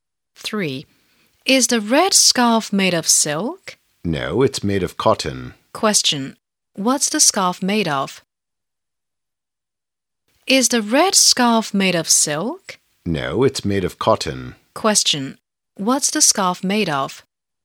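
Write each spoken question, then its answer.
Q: What's the scarf made of?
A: Cotton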